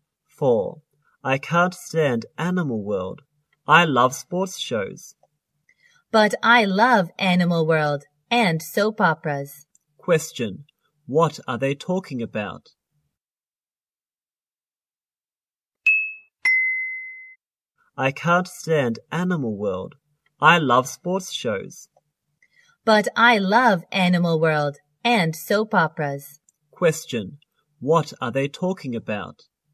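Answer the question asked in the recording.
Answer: TV shows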